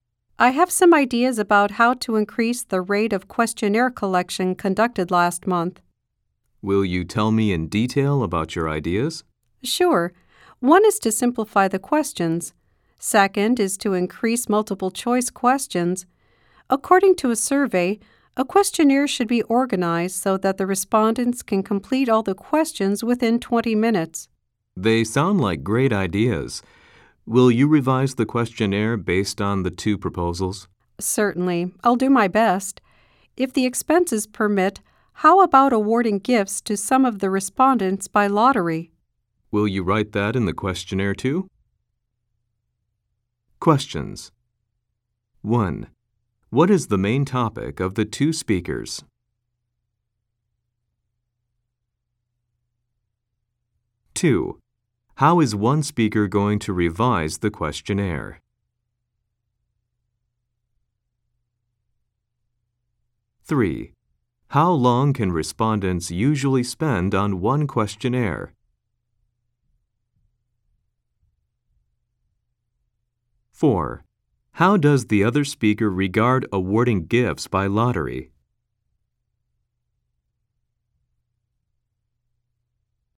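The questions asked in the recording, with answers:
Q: What is the main topic of the two speakers?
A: How to increase the collection rate of the questionnaire

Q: How is one speaker going to revise the questionnaire?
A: By simplifying the questions and adding more multiple-choice questions

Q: How long can respondents usually spend on one questionnaire?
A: Within 20 minutes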